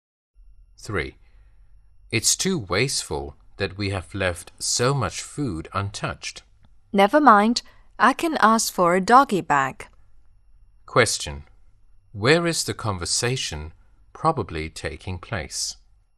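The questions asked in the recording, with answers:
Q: Where is the conversation probably taking place?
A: In a restaurant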